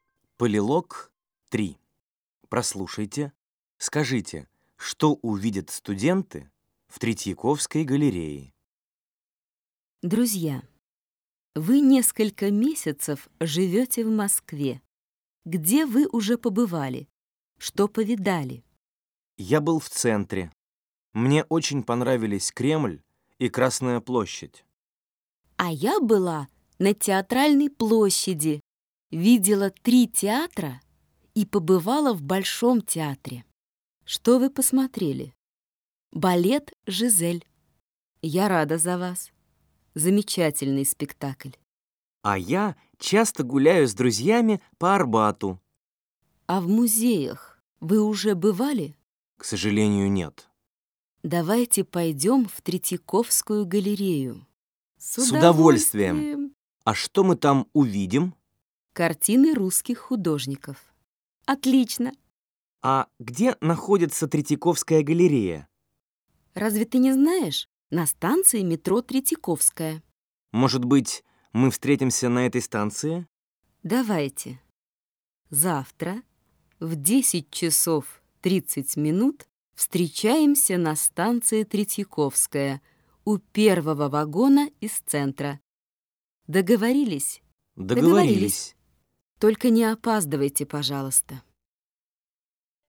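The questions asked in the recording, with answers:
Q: Прослушайте, скажите, что увидят студенты в Третьяковской галерее?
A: Картины русских художников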